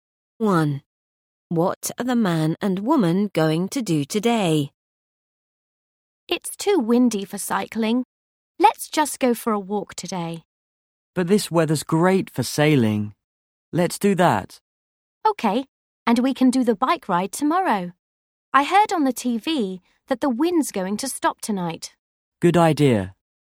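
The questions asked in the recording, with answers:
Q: What are the man and woman going to do today?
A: Go sailing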